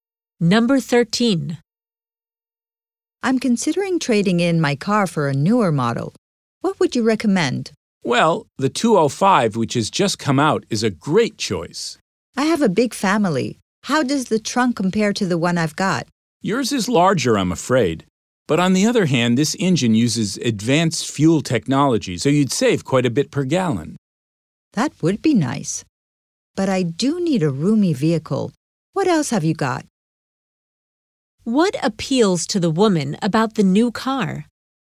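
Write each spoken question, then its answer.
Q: What appeals to the woman about the new car?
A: Its fuel efficiency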